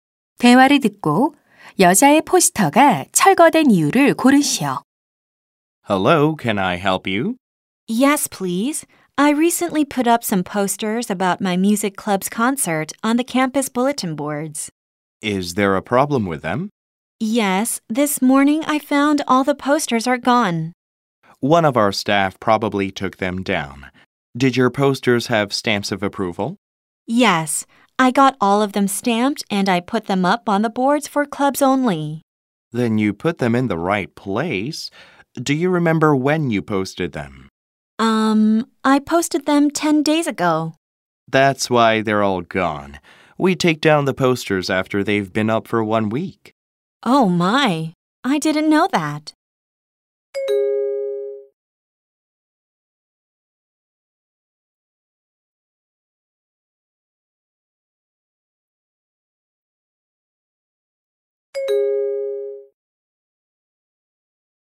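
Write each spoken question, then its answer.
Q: 대화를 듣고 여자의 포스터가 철거된 이유를 고르시오.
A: 게시한 지 일주일이 넘어서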